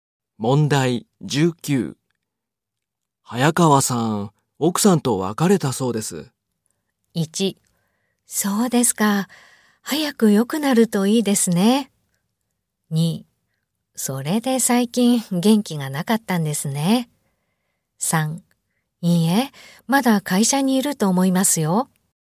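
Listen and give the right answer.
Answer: 2: それで最近元気がなかったんですね。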